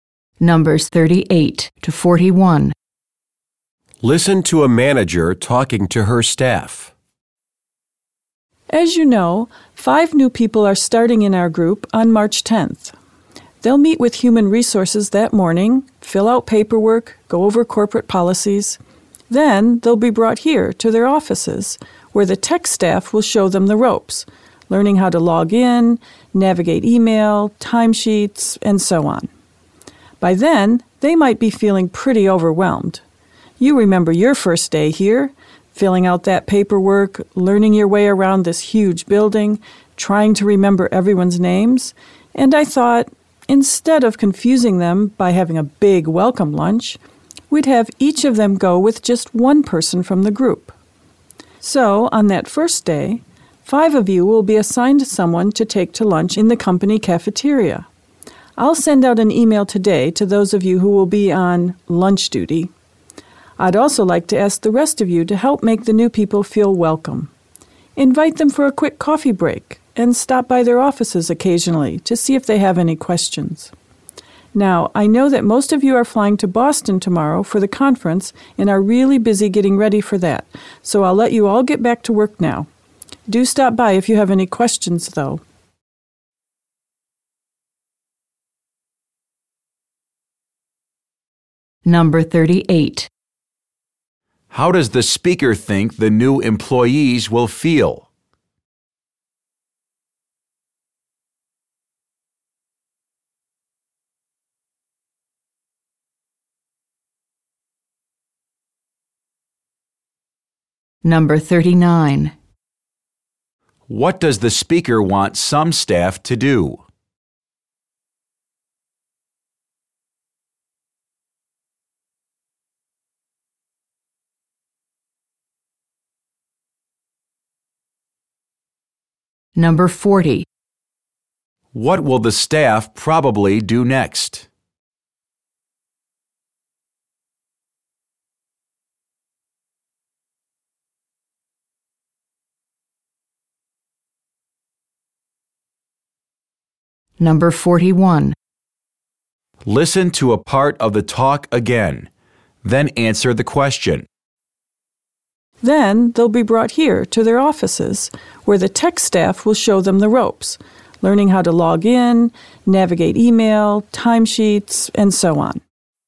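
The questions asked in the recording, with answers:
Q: How does the speaker think the new employees will feel?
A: Overwhelmed

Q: What does the speaker want some staff to do?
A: Take a new employee to lunch in the company cafeteria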